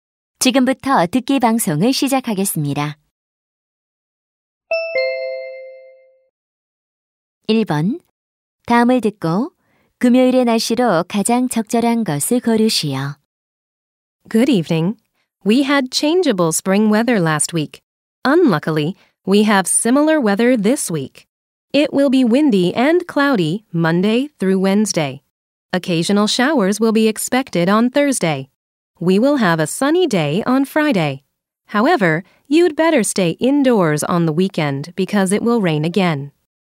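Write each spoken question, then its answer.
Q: 다음을 듣고 금요일의 날씨로 가장 적절한 것을 고르시오.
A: 맑음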